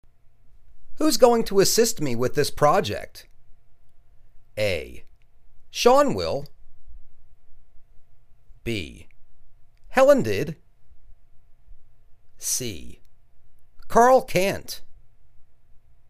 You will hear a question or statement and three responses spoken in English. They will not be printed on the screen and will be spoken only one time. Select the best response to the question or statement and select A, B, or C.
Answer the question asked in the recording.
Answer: Sean will.